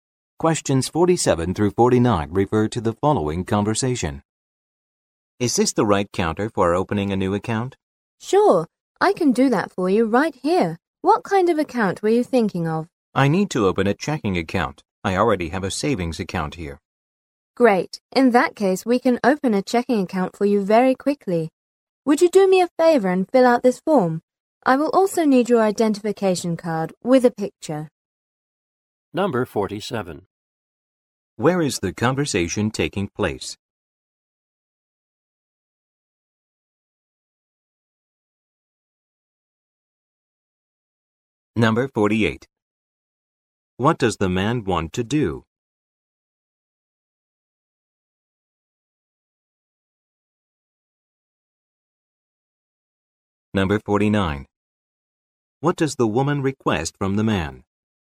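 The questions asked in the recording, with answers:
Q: Where is the conversation taking place?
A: At a bank

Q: What does the man want to do?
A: Open a checking account

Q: What does the woman request from the man?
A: Fill out a form and show photo ID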